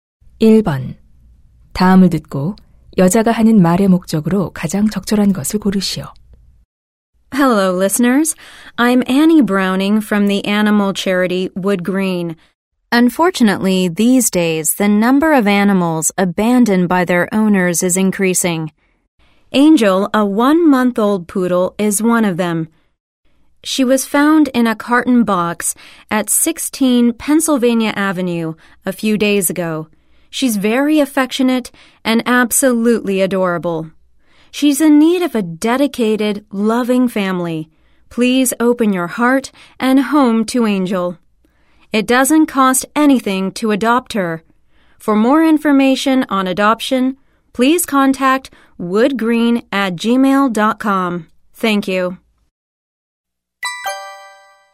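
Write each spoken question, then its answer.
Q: 다음을 듣고 여자가 하는 말의 목적으로 가장 적절한 것을 고르시오.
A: 유기견 Angel의 입양을 권장하려고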